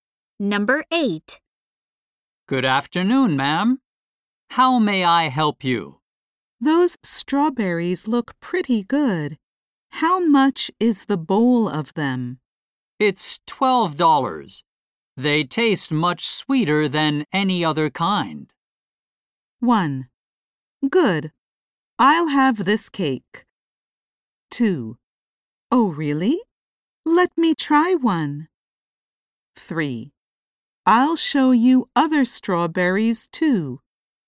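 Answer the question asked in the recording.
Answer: 2: Oh, really? Let me try one.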